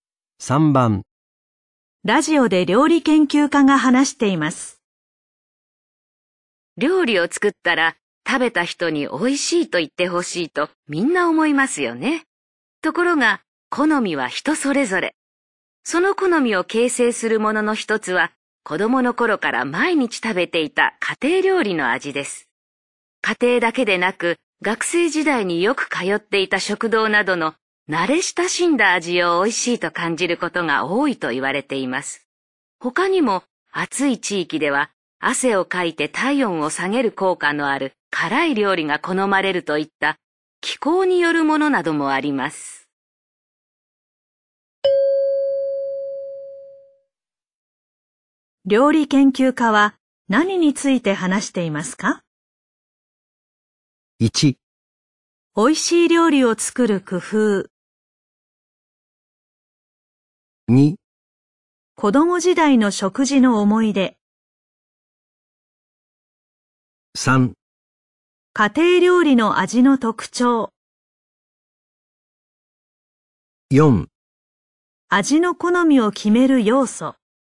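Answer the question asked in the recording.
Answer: 4: 味の好みを決める要素。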